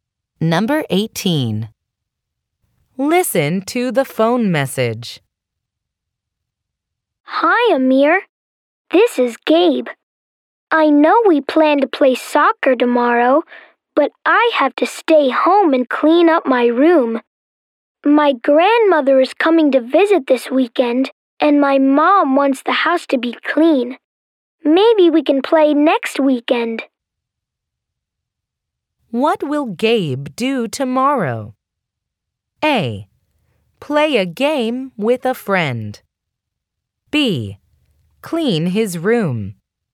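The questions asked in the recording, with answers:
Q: What will Gabe do tomorrow?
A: B: Clean his room.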